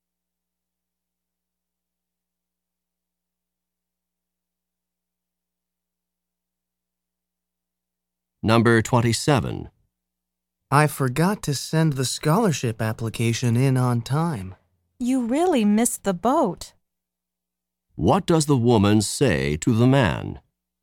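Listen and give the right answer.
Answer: He missed his chance.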